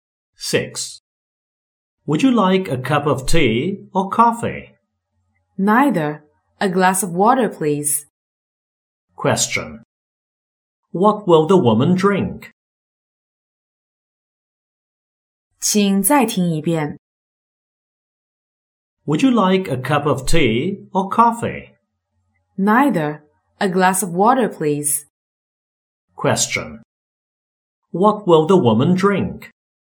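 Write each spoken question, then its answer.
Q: What will the woman drink?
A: A glass of water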